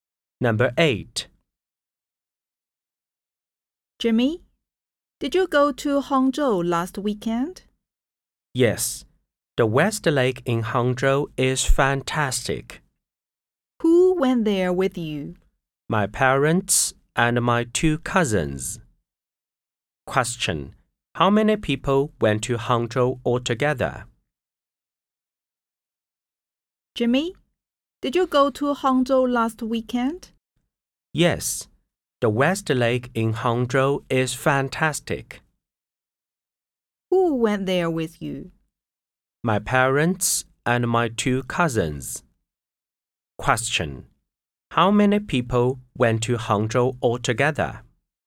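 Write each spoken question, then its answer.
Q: How many people went to Hangzhou altogether?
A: Five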